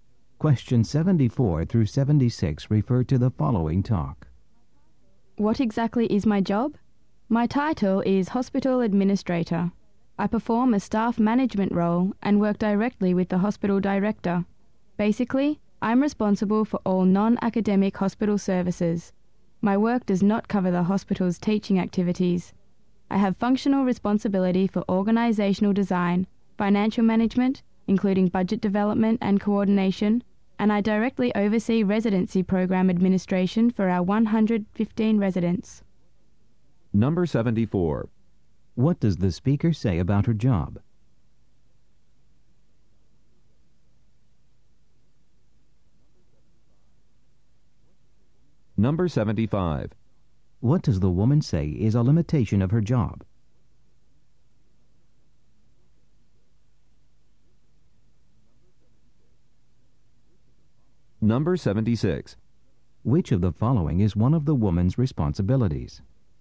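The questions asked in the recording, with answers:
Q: What does the speaker say about her job?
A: She is a hospital administrator responsible for non-academic services

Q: What does the woman say is a limitation of her job?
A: It doesn't cover teaching activities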